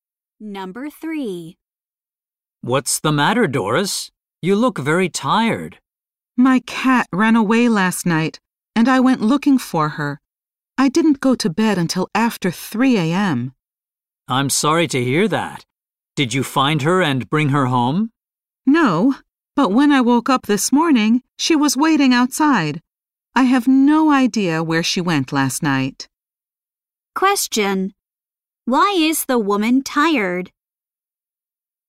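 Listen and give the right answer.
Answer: She stayed up until after 3 a.m. looking for her cat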